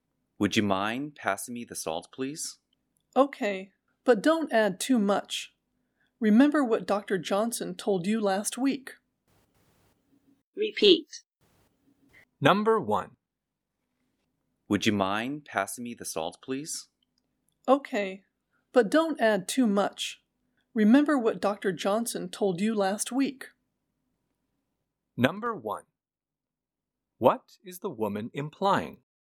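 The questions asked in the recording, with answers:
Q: What is the woman implying?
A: The man should not use too much salt, as his doctor advised.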